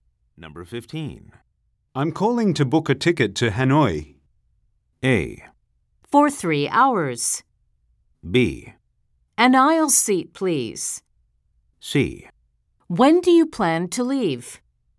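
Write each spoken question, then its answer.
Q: I'm calling to book a ticket to Hanoi.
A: C: When do you plan to leave?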